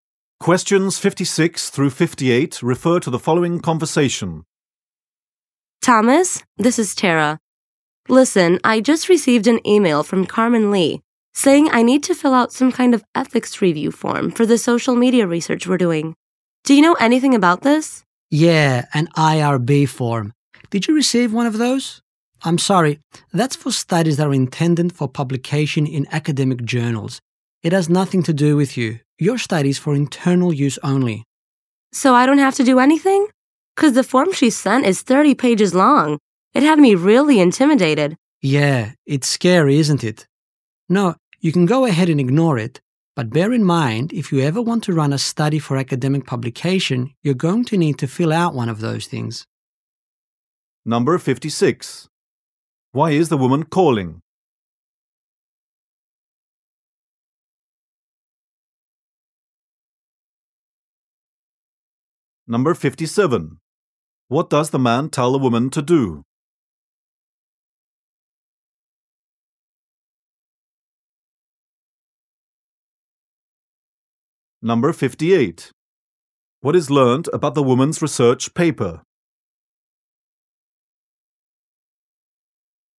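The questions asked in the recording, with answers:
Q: Why is the woman calling?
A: To ask about an ethics review form she was sent.

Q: What does the man tell the woman to do?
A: Ignore the form.

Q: What is learned about the woman's research paper?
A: It is for internal use only.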